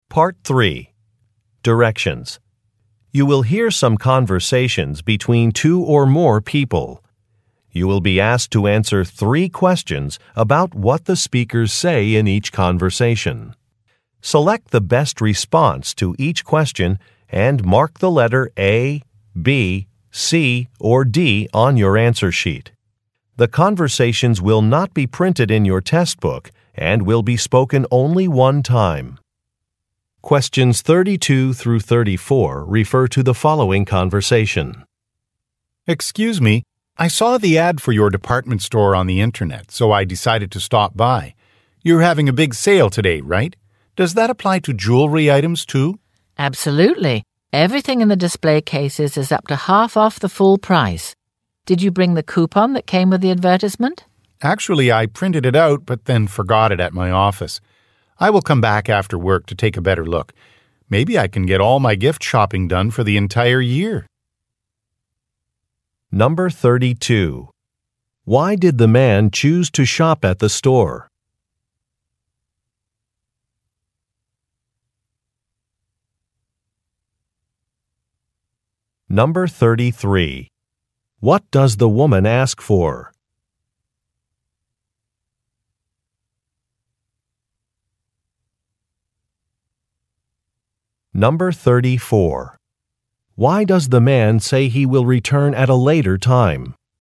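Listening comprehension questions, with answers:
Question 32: Why did the man choose to shop at the store?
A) The staff is very helpful.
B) The store is close to his office.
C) He saw an online advertisement.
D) His friend recommended the store.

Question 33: What does the woman ask for?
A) A credit card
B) A discount coupon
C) A customer receipt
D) A piece of identification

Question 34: Why does the man say he will return at a later time?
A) He is late for a meeting.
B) He wants to go to another store.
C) He has to make a phone call.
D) He left something at the office.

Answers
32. C
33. B
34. D

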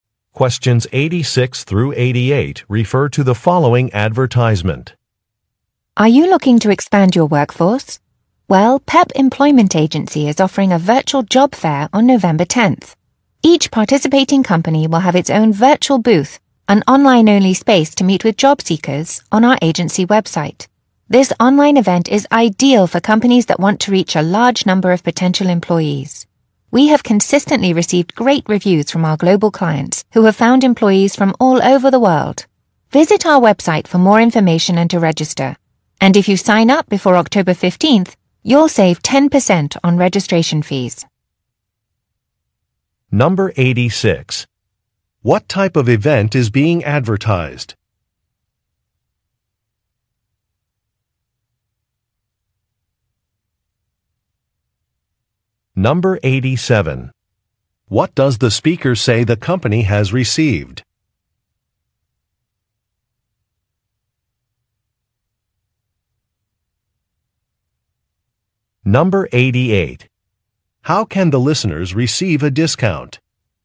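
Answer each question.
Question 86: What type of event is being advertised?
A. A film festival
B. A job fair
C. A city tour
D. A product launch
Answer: B

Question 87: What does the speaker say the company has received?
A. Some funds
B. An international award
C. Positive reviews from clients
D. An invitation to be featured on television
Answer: C

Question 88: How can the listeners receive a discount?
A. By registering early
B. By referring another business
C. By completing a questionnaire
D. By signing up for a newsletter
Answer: A

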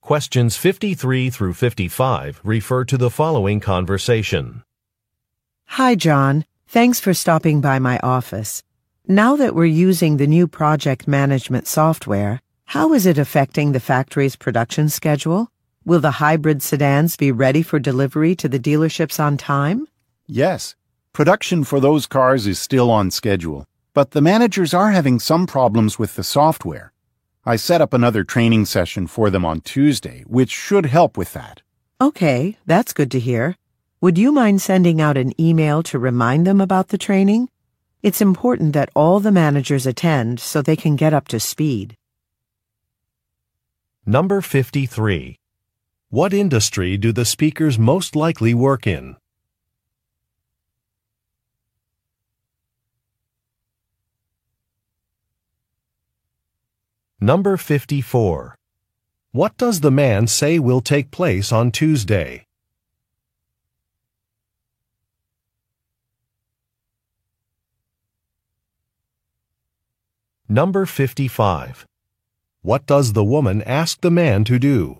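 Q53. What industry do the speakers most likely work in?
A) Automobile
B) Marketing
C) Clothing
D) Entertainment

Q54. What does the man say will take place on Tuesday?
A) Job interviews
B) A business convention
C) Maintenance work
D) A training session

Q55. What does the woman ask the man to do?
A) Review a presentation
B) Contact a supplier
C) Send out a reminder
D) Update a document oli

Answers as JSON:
{"53": "A", "54": "D", "55": "C"}

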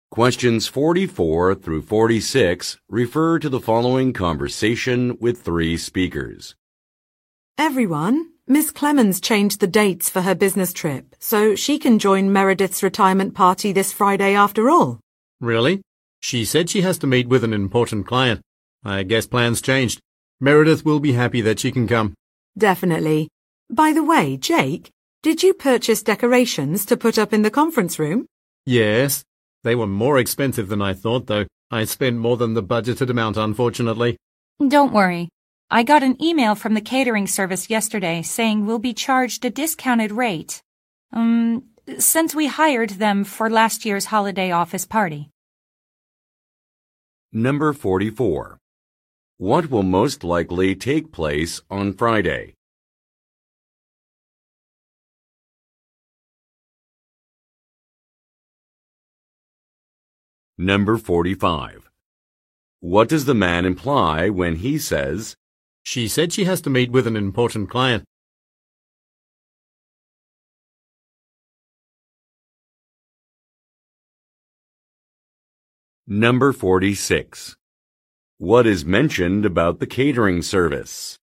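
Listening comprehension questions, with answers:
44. What will most likely take place on Friday?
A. A corporate fund-raiser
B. An award banquet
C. A birthday party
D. A farewell gathering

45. What does the man imply when he says, "She said she has to meet with an important client"?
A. He is concerned about a colleague.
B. He wants to change an itinerary.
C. He is surprised by some news.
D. He needs to confirm some arrangements.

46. What is mentioned about the catering service?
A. It is too expensive.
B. It was used for another event.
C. It has good online reviews.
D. It was booked yesterday.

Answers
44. D
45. C
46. B

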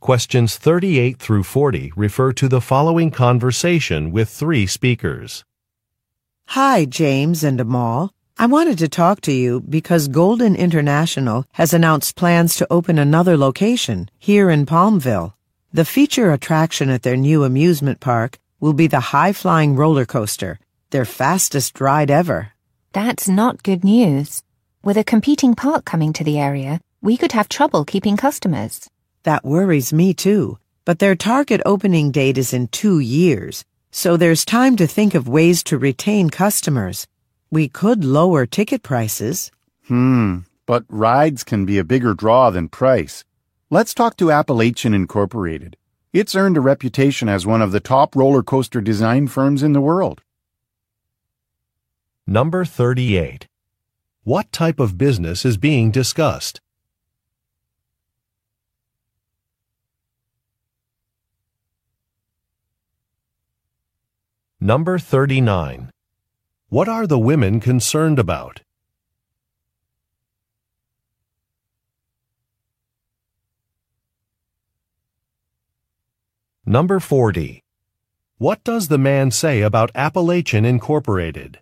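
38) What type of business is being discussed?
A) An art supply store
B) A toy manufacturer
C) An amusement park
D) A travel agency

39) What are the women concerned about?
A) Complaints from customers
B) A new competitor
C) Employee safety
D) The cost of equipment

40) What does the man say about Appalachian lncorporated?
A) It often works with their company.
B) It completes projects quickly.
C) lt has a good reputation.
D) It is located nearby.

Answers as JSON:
{"38": "C", "39": "B", "40": "C"}

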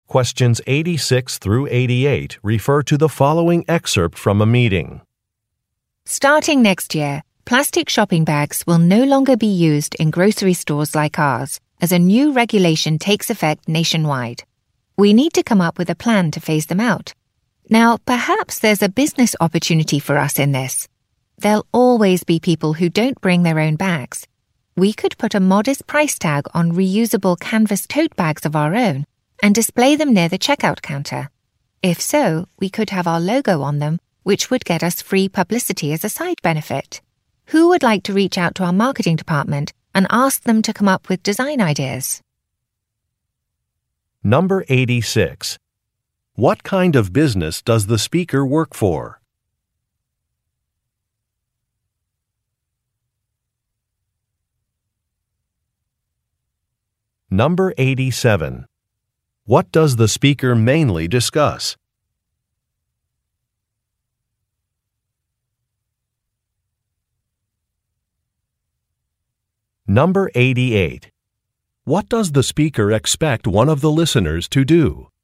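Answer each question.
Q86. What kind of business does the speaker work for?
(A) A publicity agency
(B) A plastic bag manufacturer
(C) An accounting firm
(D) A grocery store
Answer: D

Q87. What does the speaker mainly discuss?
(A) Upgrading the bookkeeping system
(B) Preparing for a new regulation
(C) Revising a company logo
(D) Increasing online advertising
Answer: B

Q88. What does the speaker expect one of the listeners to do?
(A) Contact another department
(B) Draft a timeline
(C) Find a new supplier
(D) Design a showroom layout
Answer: A

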